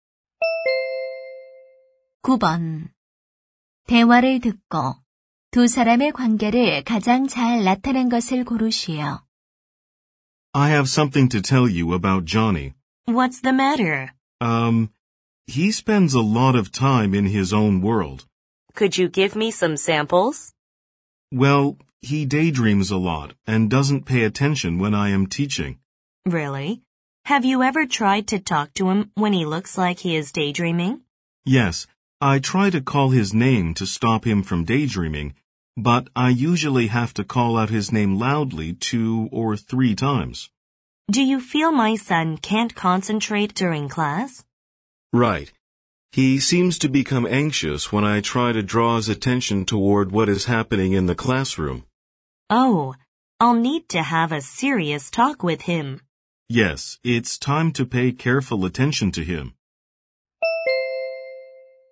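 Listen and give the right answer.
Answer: 교사 - 학부모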